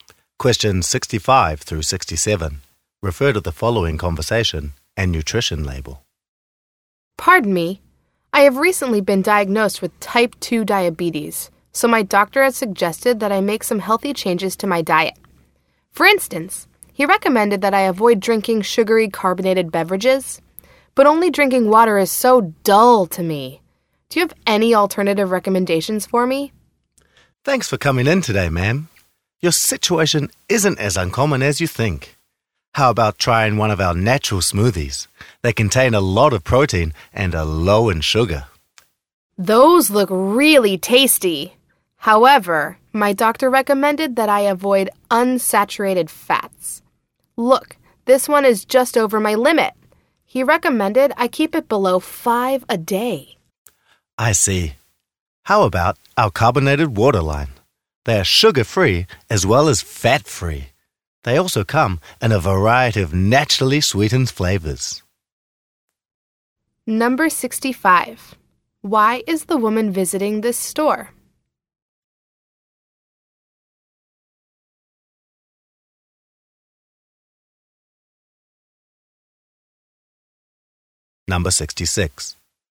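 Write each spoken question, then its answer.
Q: Why is the woman visiting this store?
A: To find healthy drink alternatives for her diabetes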